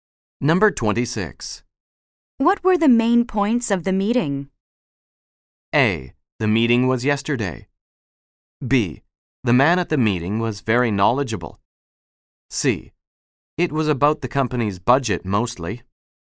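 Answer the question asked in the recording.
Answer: C: It was about the company's budget mostly.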